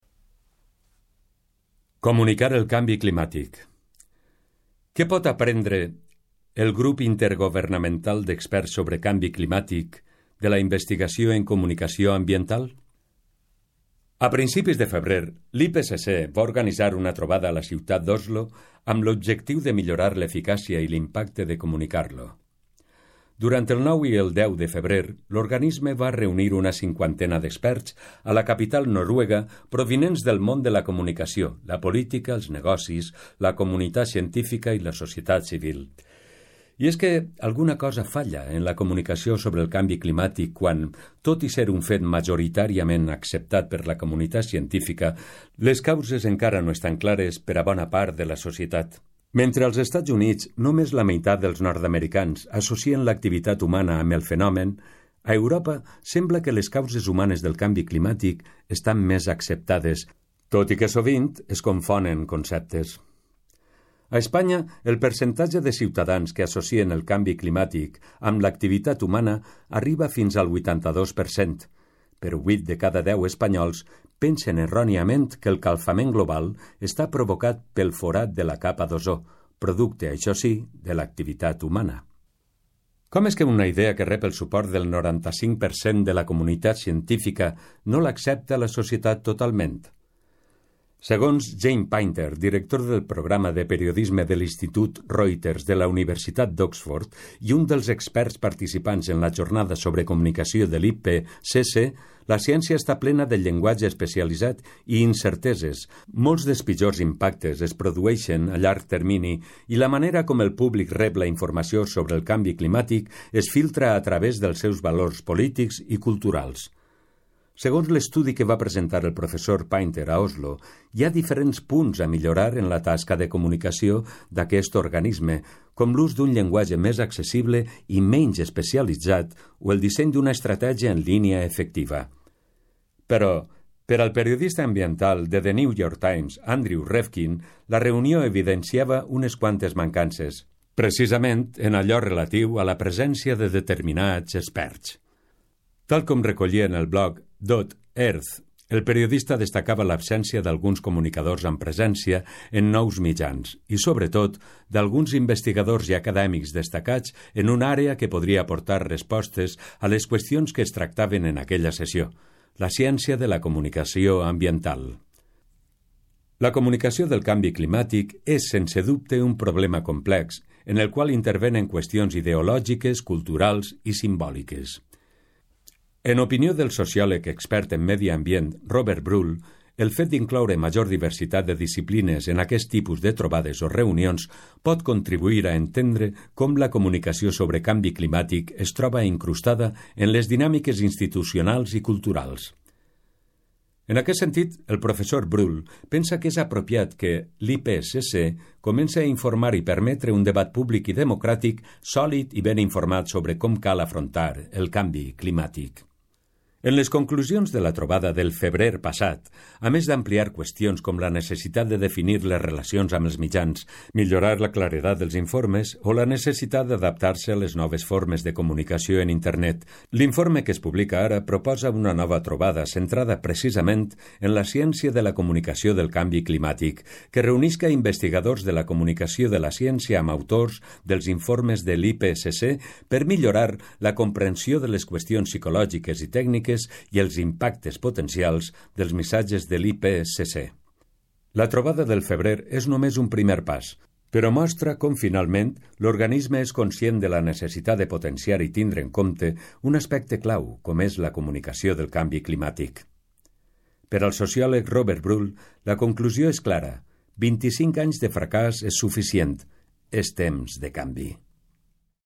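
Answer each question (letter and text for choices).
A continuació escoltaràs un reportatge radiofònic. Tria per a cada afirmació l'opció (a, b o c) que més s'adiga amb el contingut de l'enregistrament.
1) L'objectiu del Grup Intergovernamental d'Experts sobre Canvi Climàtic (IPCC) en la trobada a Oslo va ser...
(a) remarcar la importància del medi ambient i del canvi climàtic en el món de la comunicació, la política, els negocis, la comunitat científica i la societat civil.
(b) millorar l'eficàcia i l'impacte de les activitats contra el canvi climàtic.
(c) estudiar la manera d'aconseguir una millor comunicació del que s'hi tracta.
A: (c) estudiar la manera d'aconseguir una millor comunicació del que s'hi tracta.

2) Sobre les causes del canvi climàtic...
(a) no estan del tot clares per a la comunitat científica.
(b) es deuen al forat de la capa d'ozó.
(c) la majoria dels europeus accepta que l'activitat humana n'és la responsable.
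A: (c) la majoria dels europeus accepta que l'activitat humana n'és la responsable.

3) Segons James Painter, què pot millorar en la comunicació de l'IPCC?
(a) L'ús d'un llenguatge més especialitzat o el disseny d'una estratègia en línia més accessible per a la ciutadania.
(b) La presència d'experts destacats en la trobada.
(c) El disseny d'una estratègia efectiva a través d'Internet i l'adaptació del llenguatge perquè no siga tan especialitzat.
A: (c) El disseny d'una estratègia efectiva a través d'Internet i l'adaptació del llenguatge perquè no siga tan especialitzat.

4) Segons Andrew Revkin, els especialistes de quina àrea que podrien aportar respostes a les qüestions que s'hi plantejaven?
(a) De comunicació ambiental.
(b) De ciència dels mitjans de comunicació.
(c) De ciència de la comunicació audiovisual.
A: (a) De comunicació ambiental.

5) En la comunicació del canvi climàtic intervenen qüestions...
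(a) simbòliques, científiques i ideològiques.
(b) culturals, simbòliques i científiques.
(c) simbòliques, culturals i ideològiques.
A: (c) simbòliques, culturals i ideològiques.

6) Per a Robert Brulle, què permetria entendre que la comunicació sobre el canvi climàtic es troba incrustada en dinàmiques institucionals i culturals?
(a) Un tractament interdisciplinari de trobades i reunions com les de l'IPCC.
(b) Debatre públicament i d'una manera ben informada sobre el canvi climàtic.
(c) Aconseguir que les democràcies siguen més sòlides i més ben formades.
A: (a) Un tractament interdisciplinari de trobades i reunions com les de l'IPCC.

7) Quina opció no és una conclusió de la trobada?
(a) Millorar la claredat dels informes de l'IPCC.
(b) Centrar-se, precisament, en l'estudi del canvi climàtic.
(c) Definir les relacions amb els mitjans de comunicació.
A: (b) Centrar-se, precisament, en l'estudi del canvi climàtic.

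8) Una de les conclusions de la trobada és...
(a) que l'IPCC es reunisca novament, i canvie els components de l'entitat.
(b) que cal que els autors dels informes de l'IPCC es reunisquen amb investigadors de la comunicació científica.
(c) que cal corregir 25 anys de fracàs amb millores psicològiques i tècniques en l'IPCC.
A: (b) que cal que els autors dels informes de l'IPCC es reunisquen amb investigadors de la comunicació científica.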